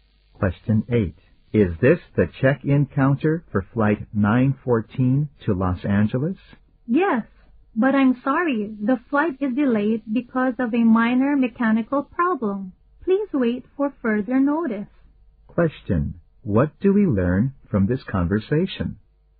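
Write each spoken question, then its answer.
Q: What do we learn from this conversation?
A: The flight is delayed by a minor mechanical problem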